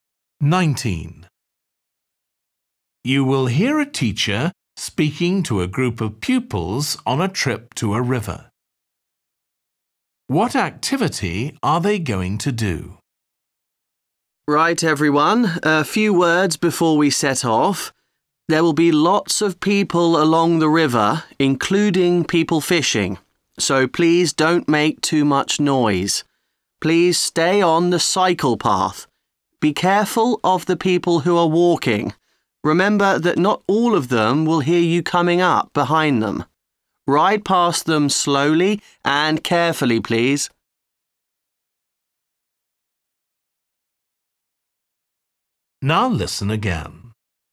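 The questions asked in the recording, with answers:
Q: What activity are they going to do?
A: Cycling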